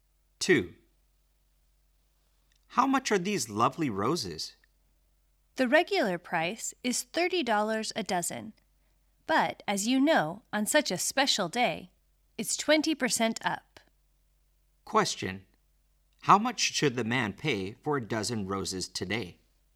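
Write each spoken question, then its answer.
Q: How much should the man pay for a dozen roses today?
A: $36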